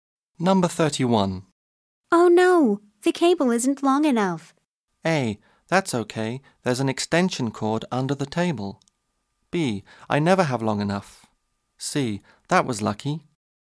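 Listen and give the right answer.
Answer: A: That's okay, there's an extension cord under the table.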